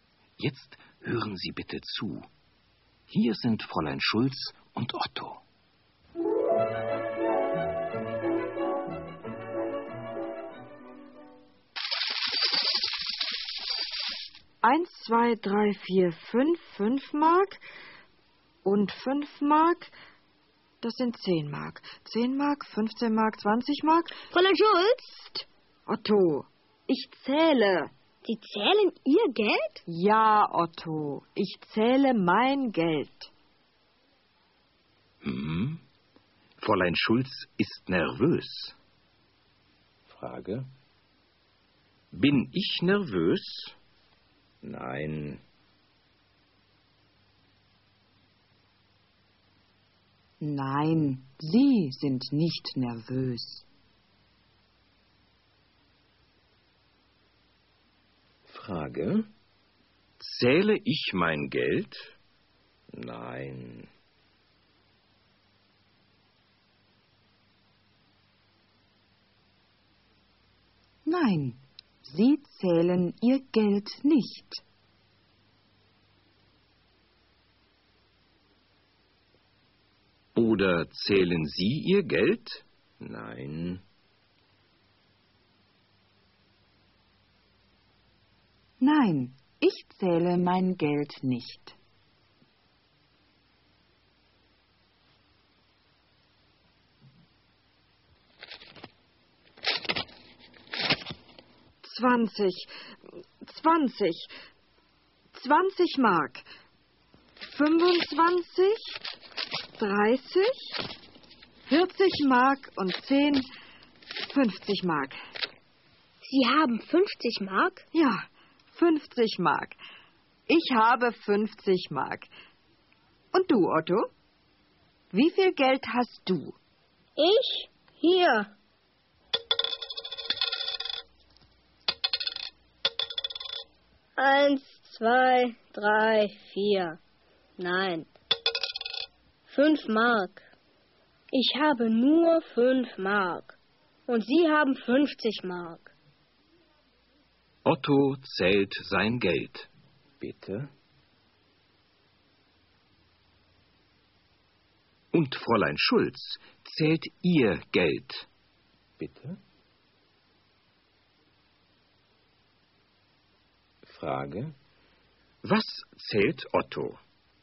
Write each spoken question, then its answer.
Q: Was zählt Otto?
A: Er zählt sein Geld.